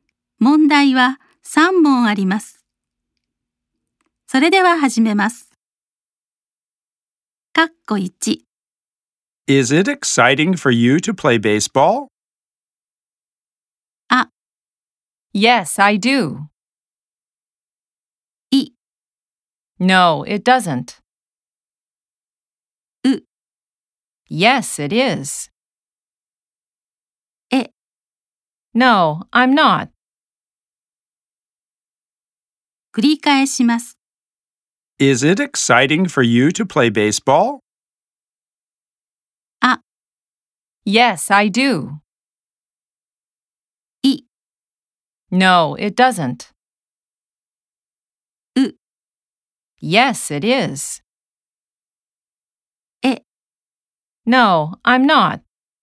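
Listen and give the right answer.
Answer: う: Yes, it is.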